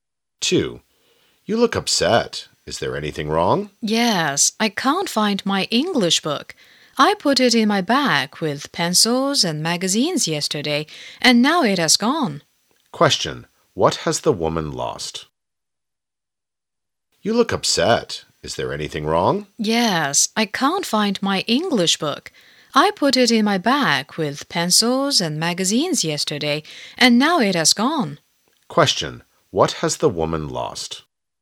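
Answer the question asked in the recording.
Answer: Her English book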